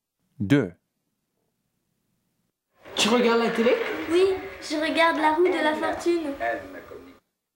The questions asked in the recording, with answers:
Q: Tu regardes la télé?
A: 2, A